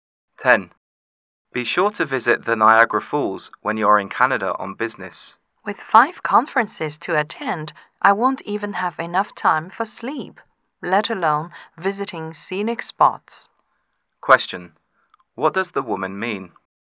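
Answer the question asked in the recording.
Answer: She will be too busy to visit Niagara Falls.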